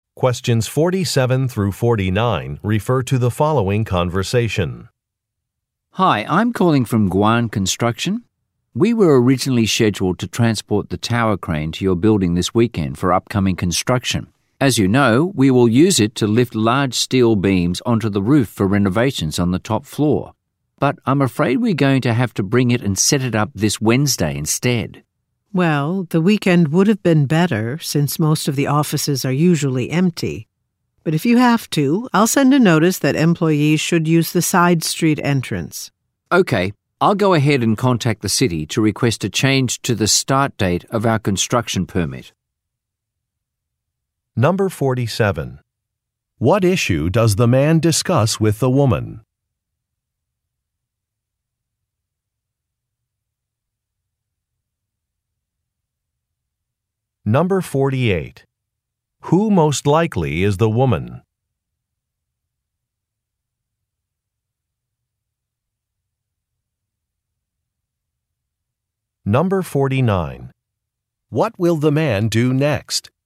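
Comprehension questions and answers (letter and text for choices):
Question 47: What issue does the man discuss with the woman?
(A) His employees need access to the roof.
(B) Part of his plan needs to be rescheduled.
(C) A shipment of steel was incomplete.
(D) A renovation project is over budget.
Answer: (B) Part of his plan needs to be rescheduled.

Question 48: Who most likely is the woman?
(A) An architect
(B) A financial analyst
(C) A construction worker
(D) A building manager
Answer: (D) A building manager

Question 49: What will the man do next?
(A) Close the building temporarily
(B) Get approval from his supervisor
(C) Reach out to city officials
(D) Arrange a new payment schedule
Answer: (C) Reach out to city officials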